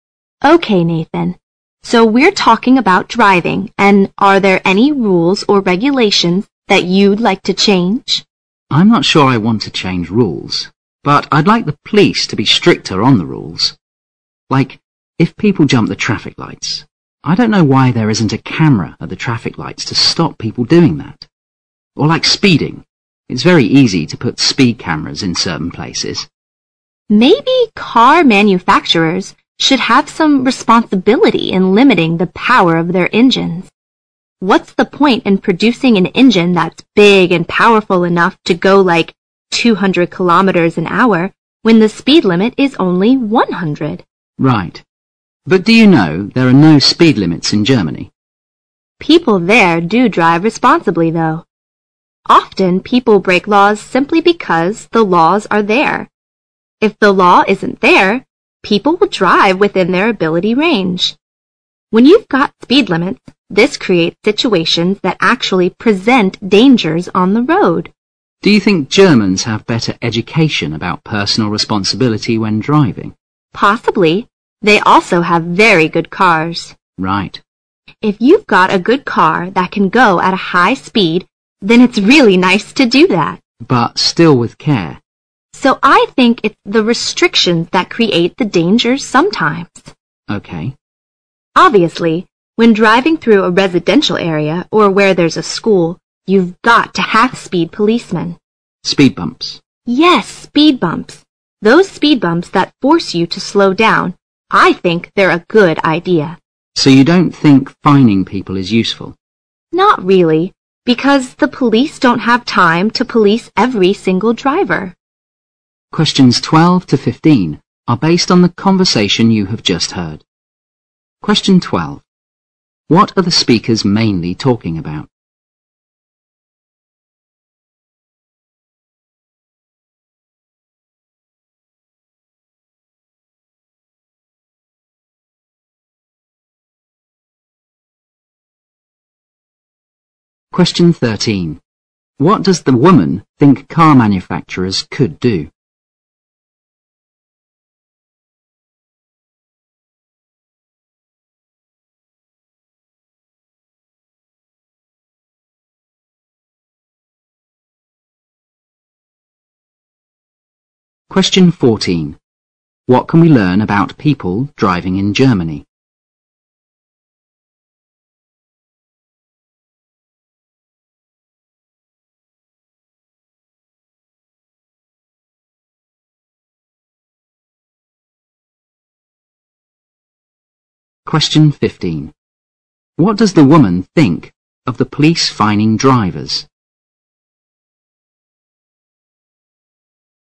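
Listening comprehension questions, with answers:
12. What are the speakers mainly talking about?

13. What does the woman think car manufacturers could do?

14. What can we learn about people driving in Germany?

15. What does the woman think of the police fining drivers?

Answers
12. Driving rules and regulations
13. Limit the power of their engines
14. There are no speed limits but people drive responsibly
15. It is not very useful because the police can't police every driver

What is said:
So we are talking about driving and are there any rules or regulations that you'd like to change?
M: I'm not sure I want to change rules. But I'd like the police to be stricter on the rules. Like if people jump the traffic lights, I don't know why there isn't a camera at the traffic lights to stop people doing that. Or like speeding. It is very easy to put speed cameras in certain places.
W: Maybe car manufacturers should have some responsibility in limiting the power of their engines. 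What's the point in producing an engine that is big and powerful enough to go like 200 km/h when the speed limit is only 100?
M: Right. But do you know there are no speed limits in Germany?
W: People there do drive responsibly, though. Often, people break laws simply because the laws are there. If the law isn't there, people will drive within their ability range. When you've got speed limit, this creates situation that actually presents dangers on the road.
M: Do you think Germans have better education about personal responsibility when driving?
W: Possibly. They also have very good cars.
M: Right.
W: If you've got a good car that can go at high speed, then it's really nice to do that.
M: But still with care.
W: So I think it is the restriction that creates the dangers sometimes.
W: Obviously, when driving through a residential area or where there is a school, you've got to have speed policeman.
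M: Speed bumps.
W: Yes, speed bumps, those speed bumps that force you to slow down. I think they're good idea.
M: So you don't think fining people is useful?
W: Not really, because the police don't have time to police every single driver.
Questions 12 to 15 are based on the conversation you have just heard.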